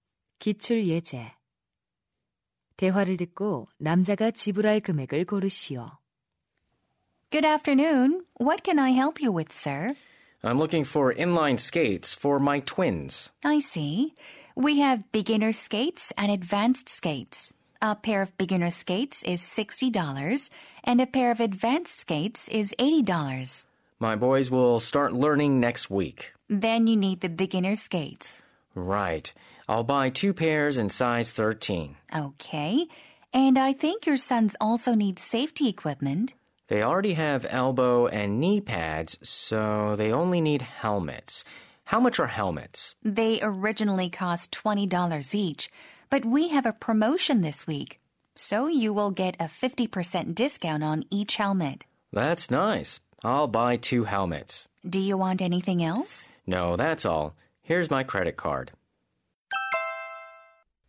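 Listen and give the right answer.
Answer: $140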